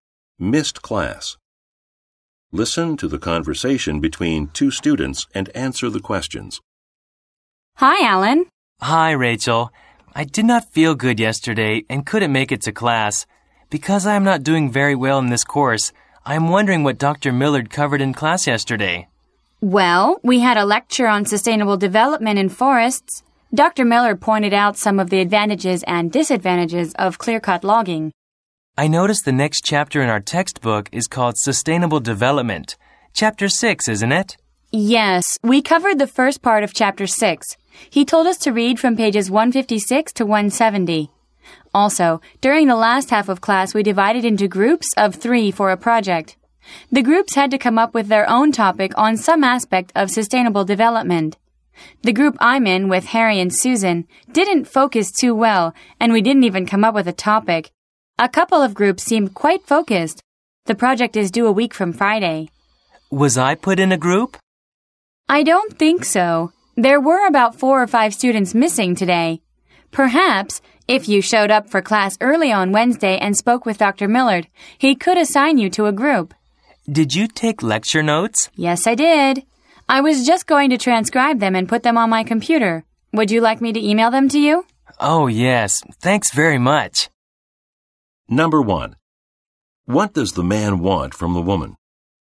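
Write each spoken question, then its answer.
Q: What does the man want from the woman?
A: Information about what was covered in the class he missed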